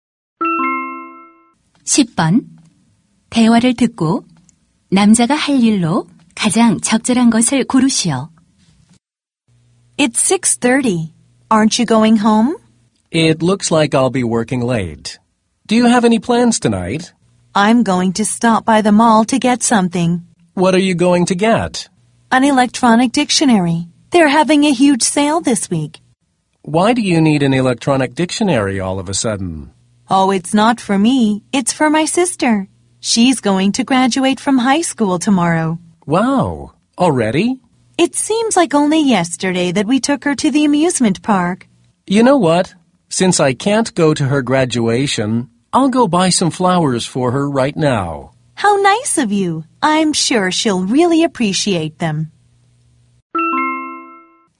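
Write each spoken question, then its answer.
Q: 대화를 듣고 남자가 할 일로 가장 적절한 것을 고르시오.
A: 여동생을 위한 꽃 사기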